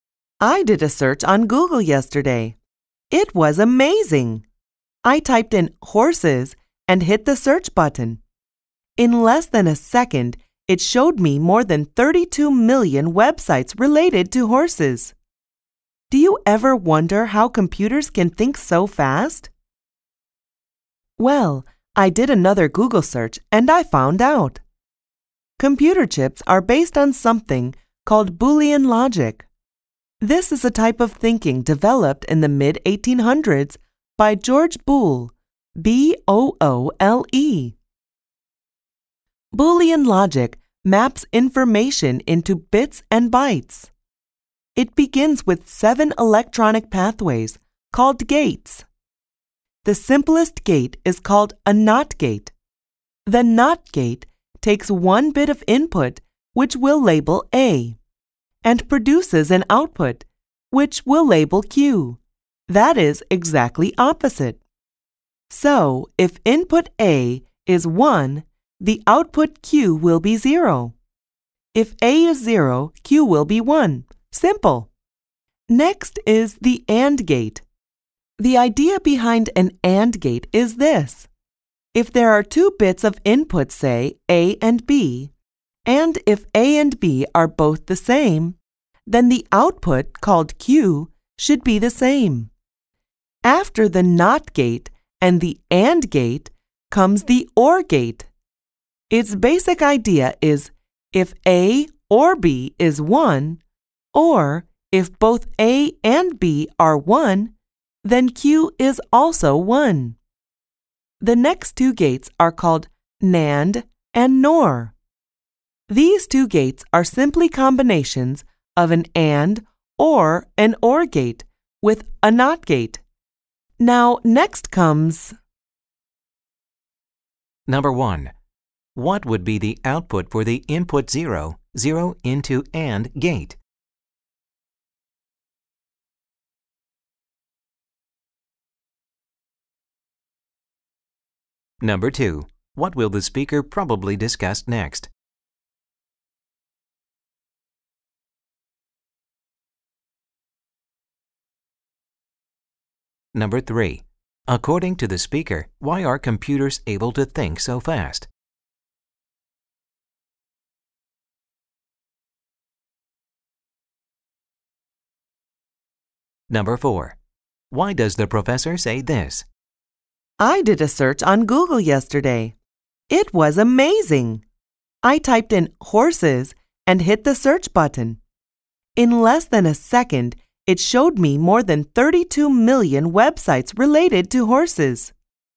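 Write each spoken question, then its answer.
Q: According to the speaker, why are computers able to think so fast?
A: Because computer chips are based on Boolean logic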